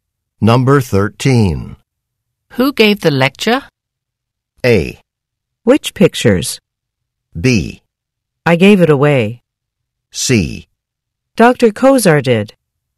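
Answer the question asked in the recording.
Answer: C: Dr. Kozar did.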